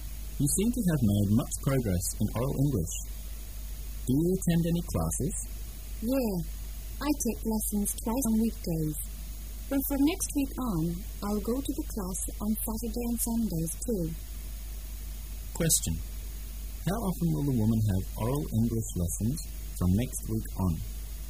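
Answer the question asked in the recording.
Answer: Every day

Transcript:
[解析] M: You seem to have made much progress in oral English. Do you attend any classes? W: Yeah, I take lessons twice in weekdays, but from next week on, I'll go to the class on Saturdays and Sundays, too. Q: How often will the woman have oral English lessons from next week on?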